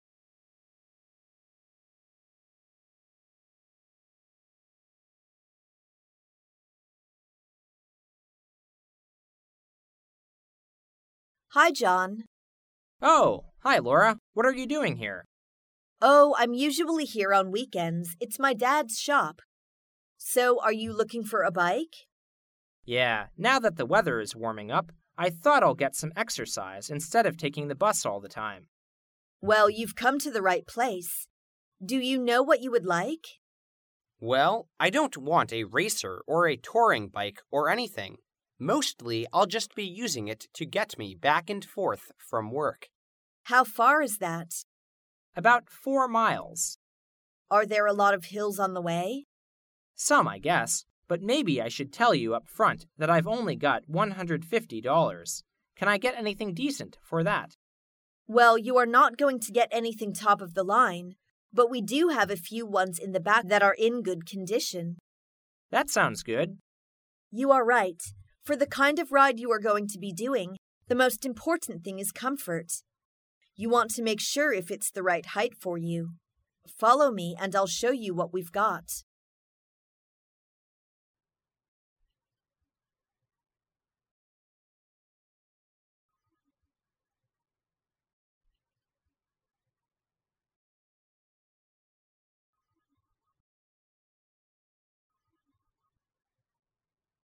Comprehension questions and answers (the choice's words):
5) What does Laura suggest that John do?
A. Buy a used bicycle.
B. Buy a racing bicycle.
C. Replace the tires on his bicycle.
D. Sell his old bicycle to the shop.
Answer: Buy a used bicycle.

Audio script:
[听力原文] 11-13 W: Hi, John. M: Oh! Hi, Laura. What are you doing here? W: Oh, I'm usually here on weekends. It's my dad's shop. So are you looking for a bike? M: Yeah. Now that the weather is warming up, I thought I'll get some exercise instead of taking the bus all the time. W: Well, you've come to the right place. Do you know what you would like? M: Well, I don't want a racer or a touring bike or anything. Mostly I'll just be using it to get me back and forth from work. W: How far is that? M: About four miles. W: Are there a lot of hills on the way? M: Some I guess. But maybe I should tell you up front that I've only got 150 dollars. Can I get anything decent for that? W: Well, you are not going to get anything top of the line. But we do have a few ones in the back that are in good condition. M: That sounds good. W: You are right. For the kind of ride you are going to be doing, the most important thing is comfort. You want to make sure it's the right height for you. Follow me and I'll show you what we've got.